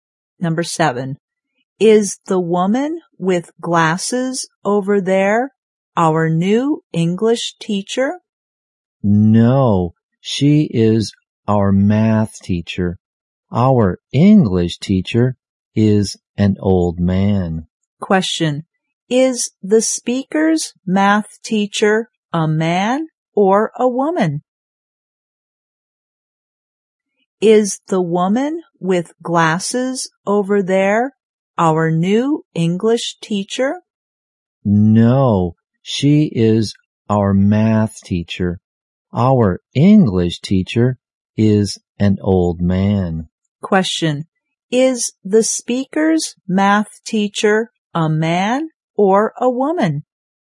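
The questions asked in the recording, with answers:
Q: Is the speaker's math teacher a man or a woman?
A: A woman.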